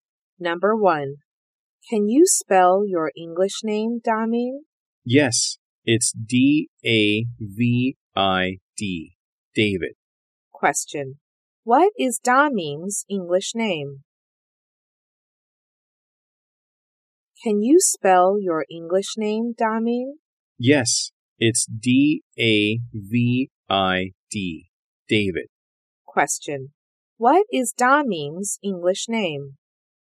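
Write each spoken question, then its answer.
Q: What is Daming's English name?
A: David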